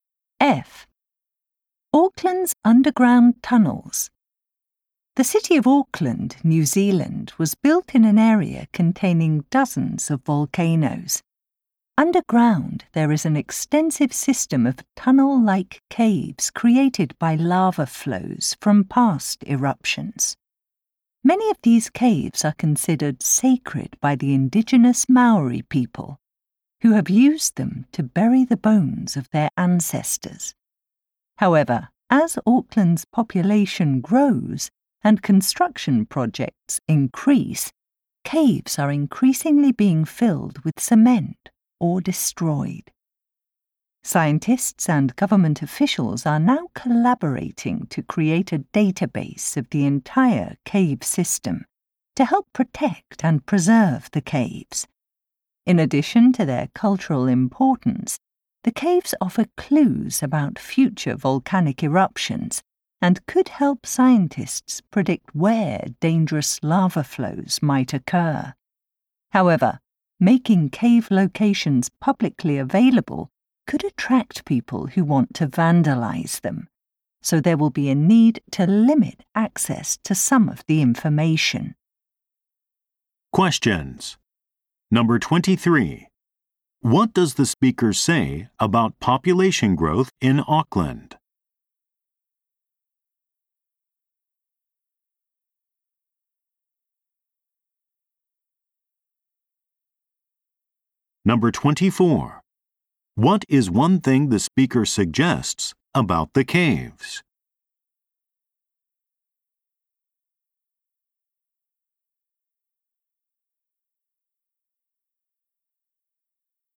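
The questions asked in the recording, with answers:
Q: What does the speaker say about population growth in Auckland?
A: It has led to more construction, and caves are being filled with cement or destroyed.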